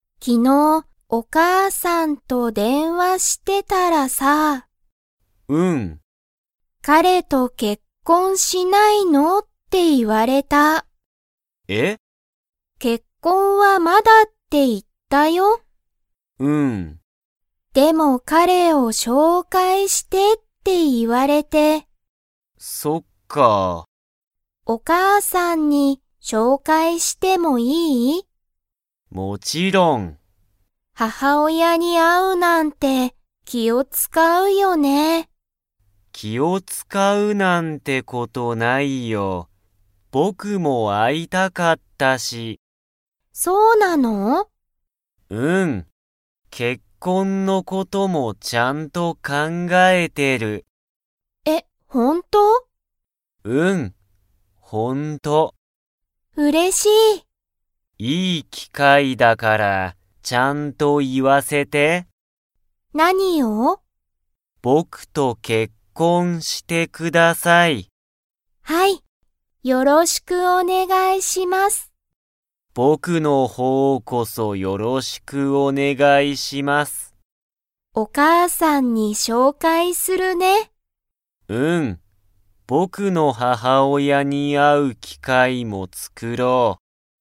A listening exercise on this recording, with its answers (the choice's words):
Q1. 昨日きのう、みきはお母かあさんと何なにをしましたか?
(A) 料理りょうり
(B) メール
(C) ゲーム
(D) 電話でんわ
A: 電話でんわ

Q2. みきとゆうは 。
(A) 結婚けっこんする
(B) 結婚けっこんしない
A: 結婚けっこんする

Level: Level 3